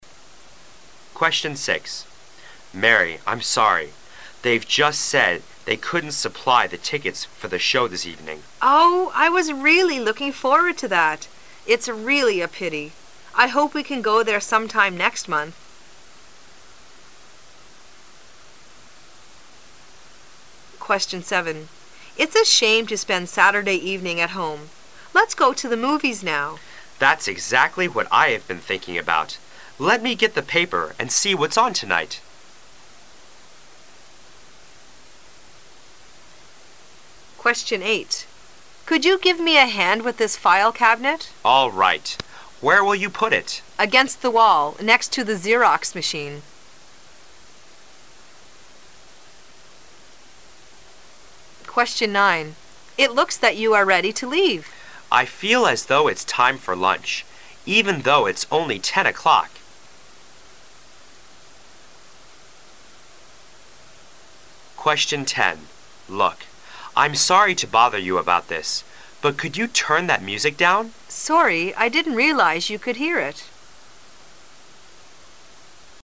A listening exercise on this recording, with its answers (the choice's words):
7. What are they going to do?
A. Read the paper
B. See a film.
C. Have dinner in town.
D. Stay at home.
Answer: See a film.

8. What are the speakers doing?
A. Painting a room.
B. Moving office furniture.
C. Buying an instrument.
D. Hanging a poster.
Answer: Moving office furniture.

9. What does the man mean?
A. It's only eleven o'clock.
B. It's time for lunch.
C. His lunch time is ten o'clock.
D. He is hungry but it's too early for lunch.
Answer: He is hungry but it's too early for lunch.

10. What will the woman probably do?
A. Look at something for the man.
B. Stop talking so much.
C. Play the music more quietly.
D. Pay more attention to the music.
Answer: Play the music more quietly.

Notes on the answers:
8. W: Could you give me a hand with this file cabinet? M: All fight. Where will. you put it? W: Against the wall, next to the Xerox machine.
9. W: It looks that you are ready to leave. M: I feel as though it's time for lunch, even though it's only 10 o'clock.